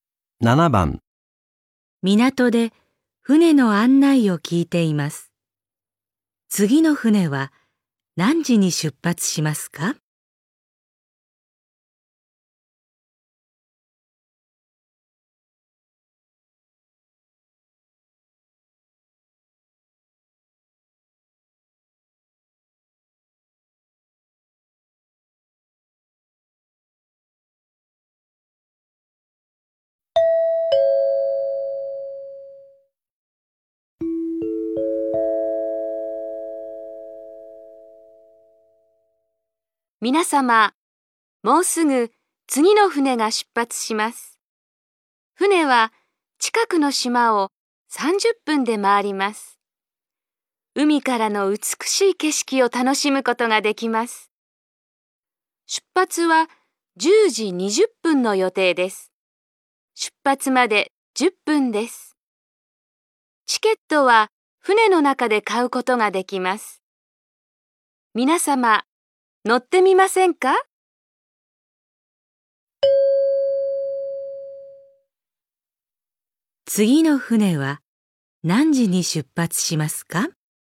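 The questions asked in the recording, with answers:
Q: 次の船は何時に出発しますか?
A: 10時20分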